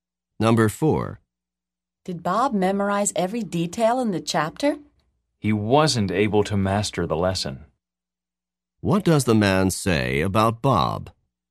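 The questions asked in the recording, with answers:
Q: What does the man say about Bob?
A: Bob didn't master the lesson.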